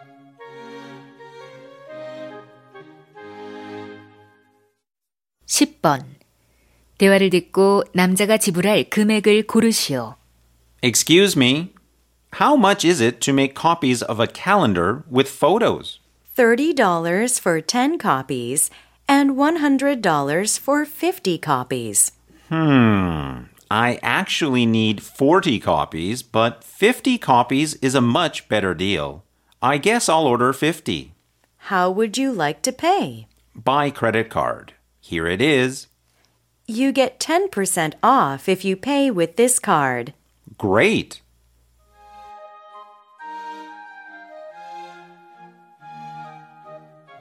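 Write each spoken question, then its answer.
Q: 대화를 듣고 남자가 지불할 금액을 고르시오.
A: 90달러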